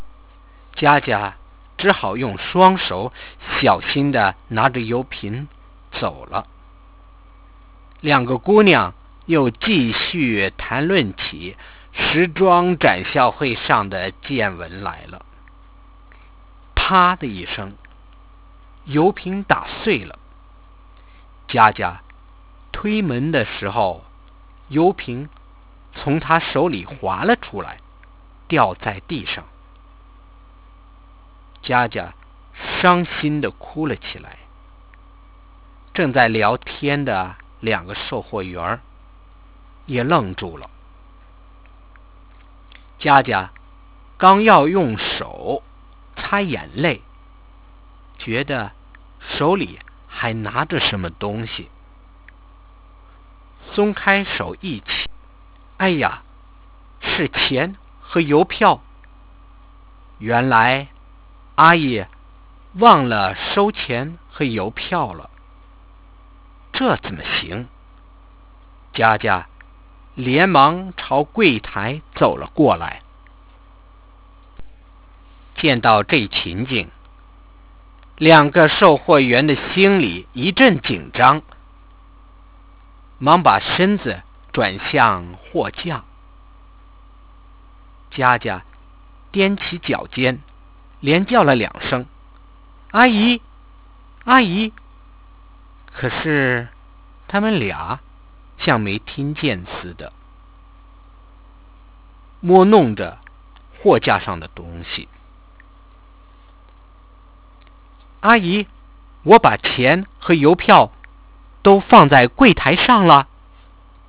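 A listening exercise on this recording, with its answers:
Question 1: Why did Jiajia went back to the counter again?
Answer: To return the money and coupons, which the assistant had forgotten to take

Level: 2nd year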